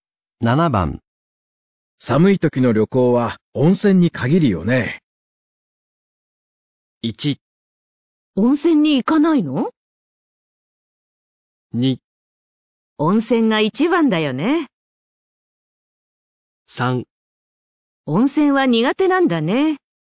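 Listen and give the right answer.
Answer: 2: 温泉が一番だよね。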